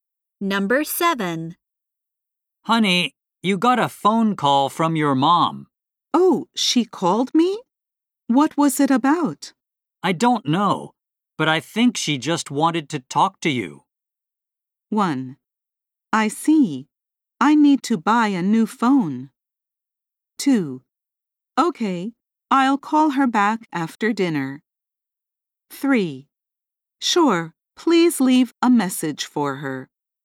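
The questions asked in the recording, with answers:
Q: I don't know, but I think she just wanted to talk to you.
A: 2: Okay, I'll call her back after dinner.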